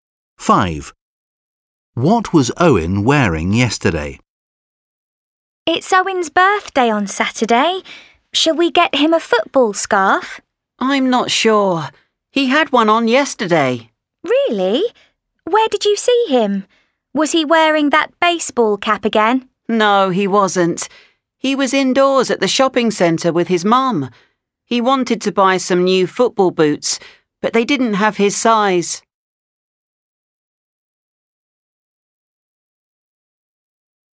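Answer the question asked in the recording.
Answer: A football scarf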